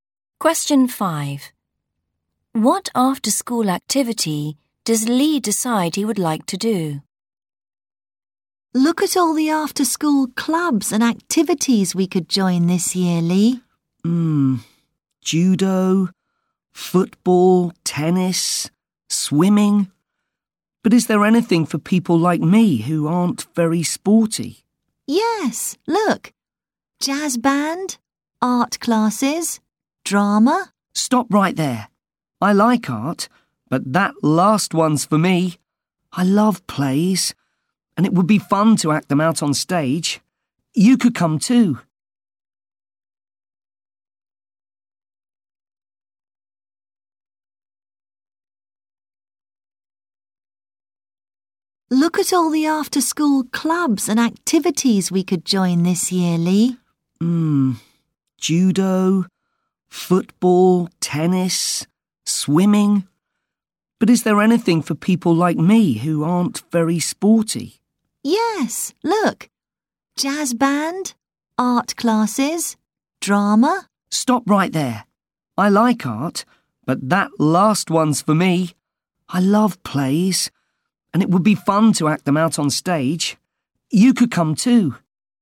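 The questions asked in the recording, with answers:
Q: What after-school activity does Lee decide he would like to do?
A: drama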